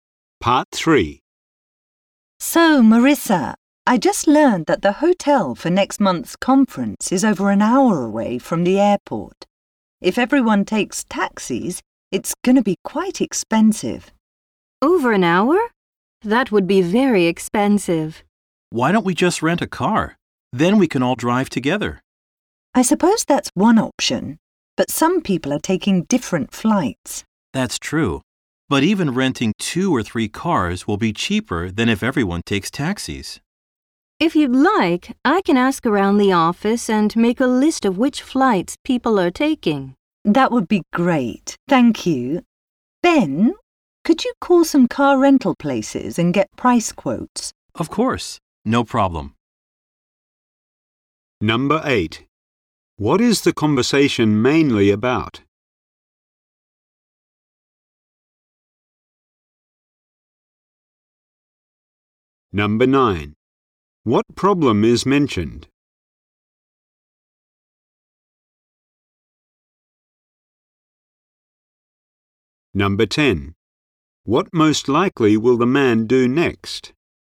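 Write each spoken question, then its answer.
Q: What is the conversation mainly about?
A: Getting from the airport to the conference hotel

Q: What problem is mentioned?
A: Taking taxis to the far hotel would be very expensive

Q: What most likely will the man do next?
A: Call car rental places to get price quotes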